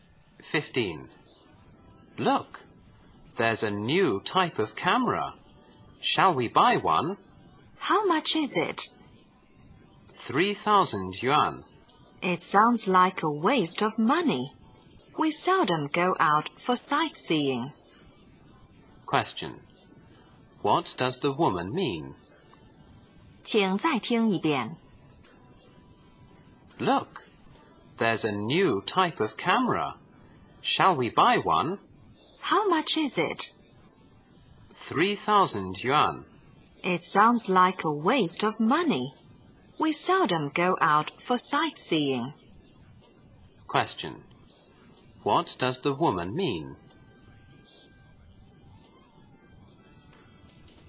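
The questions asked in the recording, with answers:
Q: What does the woman mean?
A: Buying the camera is a waste of money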